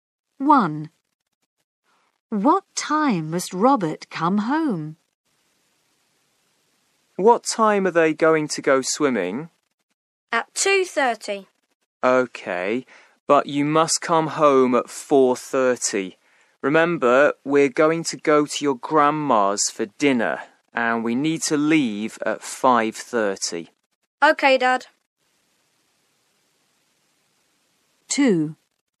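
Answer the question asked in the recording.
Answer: At 4:30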